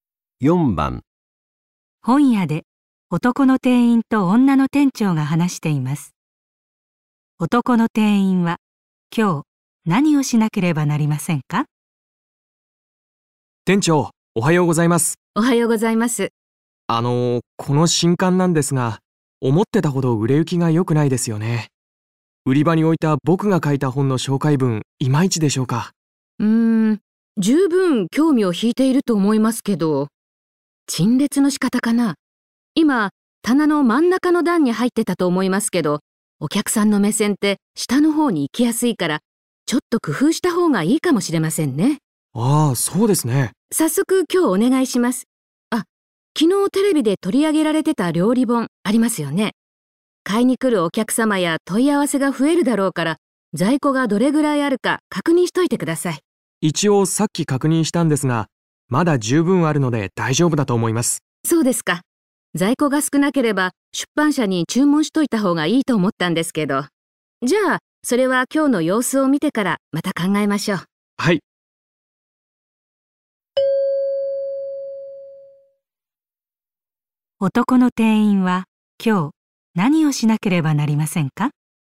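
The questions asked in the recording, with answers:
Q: 男の店員は今日何をしなければなりませんか?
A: 新刊の陳列の仕方を工夫する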